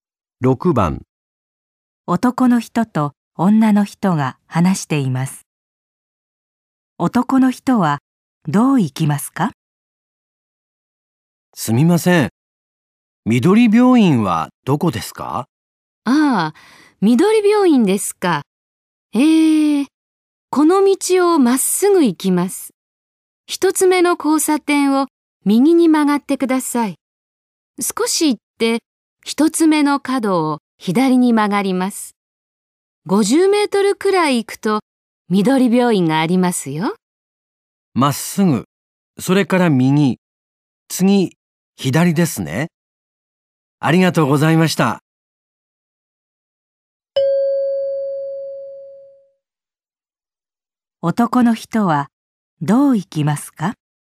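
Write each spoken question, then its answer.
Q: 男の人はどう行きますか?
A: まっすぐ行って、一つ目の交差点を右、次の角を左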